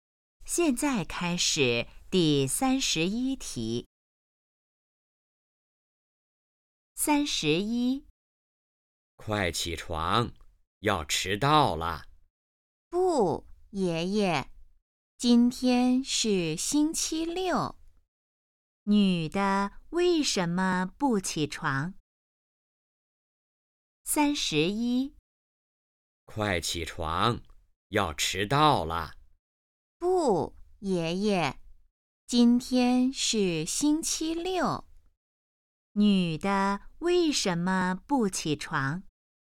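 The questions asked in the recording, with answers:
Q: 女的为什么不起床?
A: 今天是星期六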